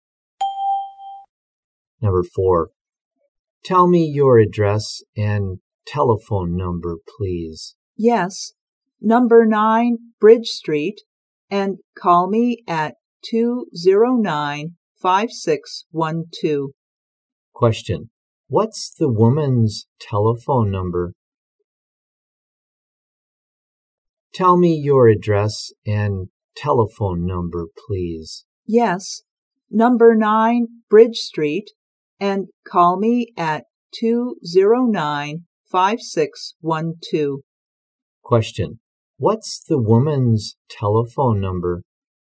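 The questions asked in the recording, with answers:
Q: what's the woman's telephone number?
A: 209-5612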